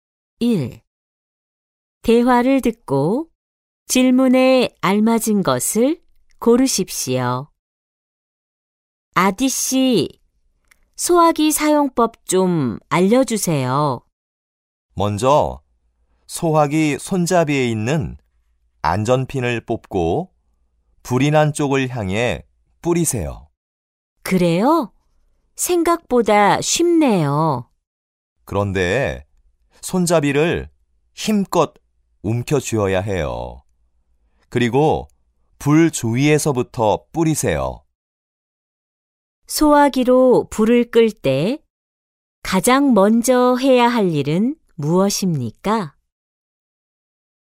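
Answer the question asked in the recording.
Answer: 손잡이에 있는 안전핀을 뽑는다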